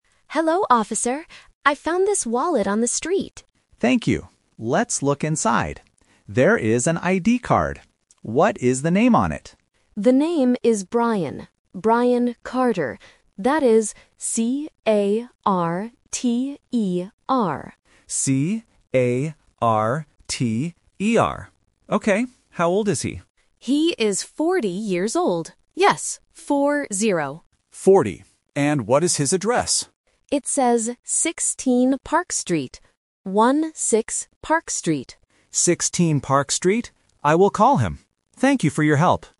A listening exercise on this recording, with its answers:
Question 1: How do you spell the man's last name?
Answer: C-A-R-T-E-R

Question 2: How old is Brian?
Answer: 40

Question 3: What is Brian's address?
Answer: 16 Park Street